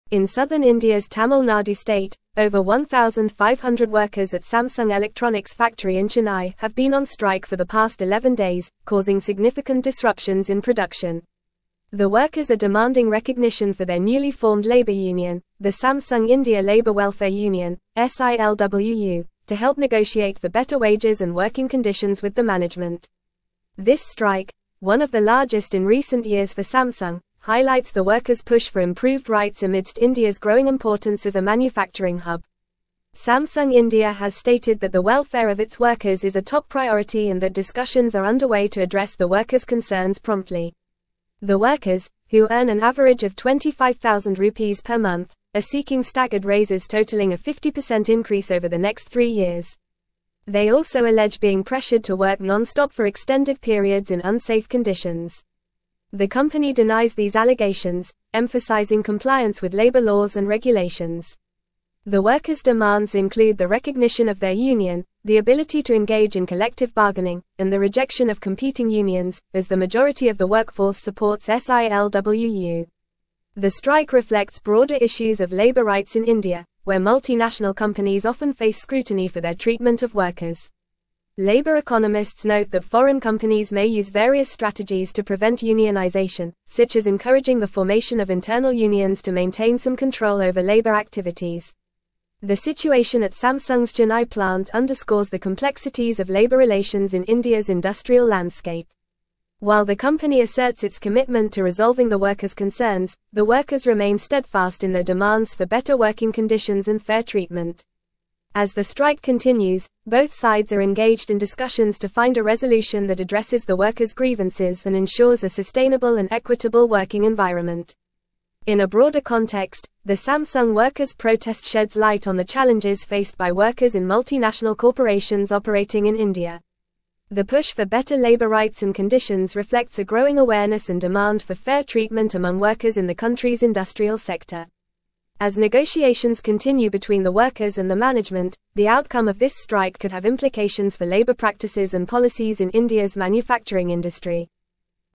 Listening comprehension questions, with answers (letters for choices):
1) What is the name of the newly-formed labor union at Samsung Electronics' factory in Chennai?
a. Chennai Workers Union (CWU)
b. Samsung India Labour Welfare Union (SILWU)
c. Tamil Nadu Labor Association (TNLA)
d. Southern India Labor Coalition (SILC)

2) How long have the workers at Samsung Electronics' factory in Chennai been on strike?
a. 11 days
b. 5 days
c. 20 days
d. 15 days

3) What is the main demand of the workers on strike at Samsung's Chennai plant?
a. Recognition of their union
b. Increase in company profits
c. Reduction in work hours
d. Removal of labor laws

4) How much of a raise are the workers seeking over the next three years?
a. 25%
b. 75%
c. 100%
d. 50%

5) What do labor economists mention as a strategy used by foreign companies to prevent unionization?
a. Supporting workers' rights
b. Encouraging the formation of internal unions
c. Advocating for fair wages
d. Allowing unlimited breaks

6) What is one of the workers' demands regarding unionization?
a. Elimination of all unions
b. No interaction with management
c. Ability to engage in collective bargaining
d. Acceptance of multiple competing unions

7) What is Samsung India's response to the workers' concerns?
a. Ignoring the demands of the workers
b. Removing all labor laws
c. The welfare of its workers is a top priority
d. Decreasing workers' wages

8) What broader implications could the outcome of the strike at Samsung's Chennai plant have?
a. No impact on labor rights in India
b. Decrease in workers' awareness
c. Increase in worker exploitation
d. Implications for labor practices and policies in India's manufacturing industry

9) The outcome of the strike at Samsung's Chennai plant could have no implications for labor practices and policies in India's manufacturing industry.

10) The strike does not reflect broader issues of labor rights in India, where multinational companies face scrutiny for their treatment of workers.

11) Samsung India has stated that the welfare of its workers is a top priority and discussions are ongoing to address the workers' concerns.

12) The workers are seeking staggered raises totaling a 50% increase over the next three years.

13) Over 1,500 workers at Samsung Electronics' factory in Chennai, India, have been on strike for the past 11 days.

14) The workers allege being pressured to work non-stop for extended periods in unsafe conditions, which the company denies.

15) The workers are NOT demanding recognition for their newly-formed labor union, the Samsung India Labour Welfare Union (SILWU), to negotiate for better wages and working conditions.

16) The strike at Samsung's Chennai plant is not one of the largest in recent years for the company.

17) In southern India's Tamil Nadu state, over 1,500 (1)______ at (2)______ Electronics' factory in Chennai have been on strike for the past 11 days, causing significant disruptions in production.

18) In southern India's Tamil Nadu state, over 1,500 (1)______ at (2)______ Electronics' factory in Chennai have been on strike for the past 11 days, causing significant disruptions in production.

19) The workers are demanding recognition for their newly-formed labor union, the Samsung India Labour Welfare Union (SILWU), to help negotiate for better wages and working conditions with the (3)______.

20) Samsung India has stated that the (4)______ of its workers is a top priority and that discussions are underway to address the workers' concerns promptly.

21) The workers, who earn an average of 25,000 rupees per month, are seeking staggered raises (5)______ a 50% increase over the next three years.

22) The company denies these (6)______, emphasizing compliance with labor laws and regulations.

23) The workers' demands include the recognition of their union, the ability to engage in collective (7)______, and the rejection of competing unions, as the majority of the workforce supports (8)______.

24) The workers' demands include the recognition of their union, the ability to engage in collective (7)______, and the rejection of competing unions, as the majority of the workforce supports (8)______.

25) The strike reflects broader issues of (9)______ rights in India, where multinational companies often face scrutiny for their treatment of workers.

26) (10)______ economists note that (11)______ companies may use various strategies to prevent unionization, such as encouraging the formation of internal unions to maintain some control over labor activities.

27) While the company asserts its commitment to resolving the workers' concerns, the workers remain steadfast in their demands for better (12)______ conditions and fair treatment.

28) As the strike continues, both sides are engaged in discussions to find a (13)______ that addresses the workers' grievances and ensures a sustainable and (14)______ working environment.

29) As the strike continues, both sides are engaged in discussions to find a (13)______ that addresses the workers' grievances and ensures a sustainable and (14)______ working environment.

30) The push for better labor rights and conditions (15)______ a growing awareness and demand for fair treatment among workers in the country's industrial sector.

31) As negotiations continue between the workers and the management, the outcome of this (16)______ could have implications for labor practices and policies in India's manufacturing industry.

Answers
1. b
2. a
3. a
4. d
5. b
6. c
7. c
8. d
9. False
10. False
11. True
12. True
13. True
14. True
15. False
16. False
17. workers
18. Samsung
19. management
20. welfare
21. totaling
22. allegations
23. bargaining
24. SILWU
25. labor
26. foreign
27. working
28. resolution
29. equitable
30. reflects
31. strike

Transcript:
In southern India's Tamil Nadu state, over 1,500 workers at Samsung Electronics' factory in Chennai have been on strike for the past 11 days, causing significant disruptions in production. The workers are demanding recognition for their newly-formed labor union, the Samsung India Labour Welfare Union (SILWU), to help negotiate for better wages and working conditions with the management. This strike, one of the largest in recent years for Samsung, highlights the workers' push for improved rights amidst India's growing importance as a manufacturing hub.
Samsung India has stated that the welfare of its workers is a top priority and that discussions are underway to address the workers' concerns promptly. The workers, who earn an average of 25,000 rupees per month, are seeking staggered raises totaling a 50% increase over the next three years. They also allege being pressured to work non-stop for extended periods in unsafe conditions. The company denies these allegations, emphasizing compliance with labor laws and regulations.
The workers' demands include the recognition of their union, the ability to engage in collective bargaining, and the rejection of competing unions, as the majority of the workforce supports SILWU. The strike reflects broader issues of labor rights in India, where multinational companies often face scrutiny for their treatment of workers. Labor economists note that foreign companies may use various strategies to prevent unionization, such as encouraging the formation of internal unions to maintain some control over labor activities.
The situation at Samsung's Chennai plant underscores the complexities of labor relations in India's industrial landscape. While the company asserts its commitment to resolving the workers' concerns, the workers remain steadfast in their demands for better working conditions and fair treatment. As the strike continues, both sides are engaged in discussions to find a resolution that addresses the workers' grievances and ensures a sustainable and equitable working environment.
In a broader context, the Samsung workers' protest sheds light on the challenges faced by workers in multinational corporations operating in India. The push for better labor rights and conditions reflects a growing awareness and demand for fair treatment among workers in the country's industrial sector. As negotiations continue between the workers and the management, the outcome of this strike could have implications for labor practices and policies in India's manufacturing industry.

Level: Level 4